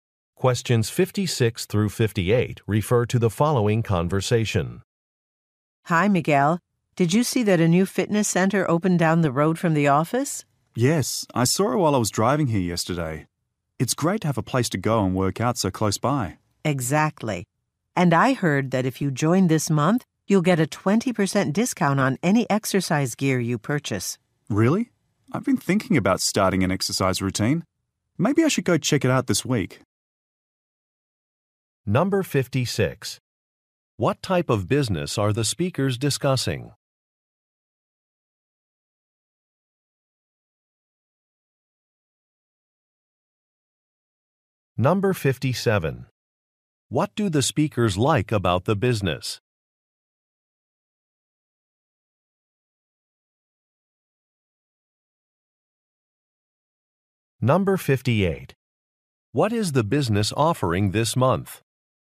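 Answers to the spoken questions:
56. A fitness center
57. It is close to the office
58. A 20% discount on exercise gear for new members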